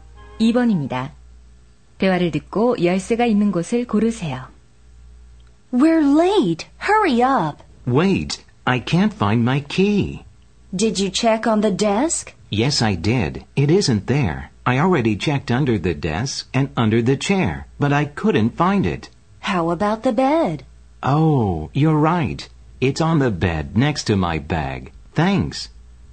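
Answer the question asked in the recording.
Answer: 침대 위 가방 옆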